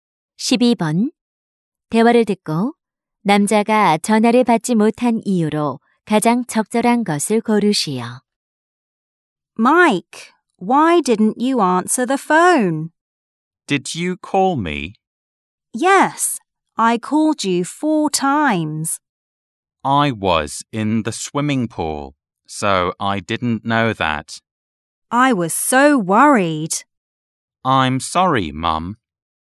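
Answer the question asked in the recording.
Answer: 수영장에 있어서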